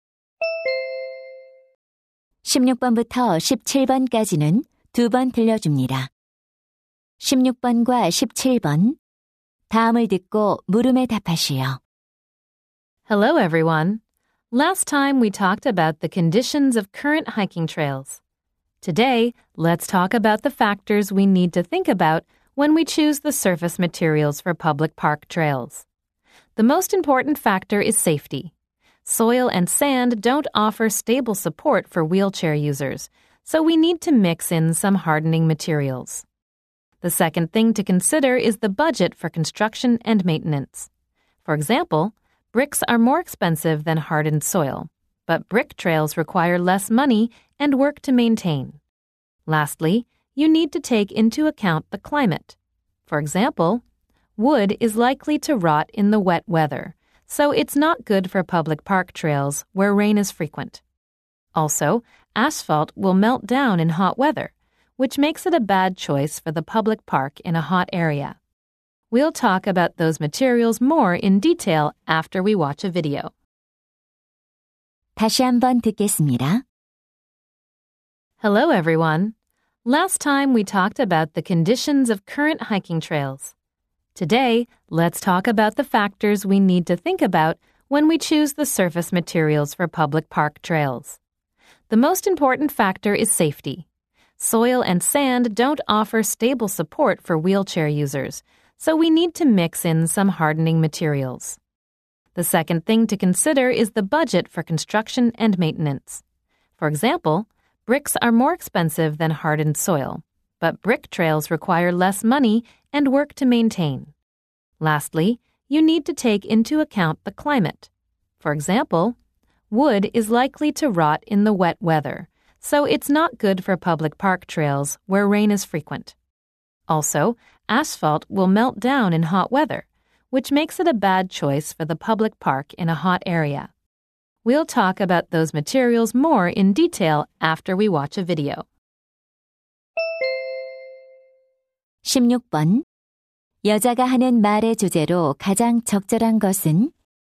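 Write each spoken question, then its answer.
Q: 여자가 하는 말의 주제로 가장 적절한 것은?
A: 공원 산책로 표면 재료 선택 시 고려할 요소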